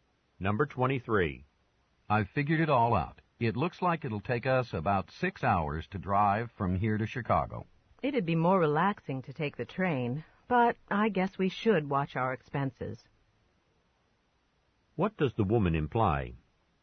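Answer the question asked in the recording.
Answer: They should drive to save money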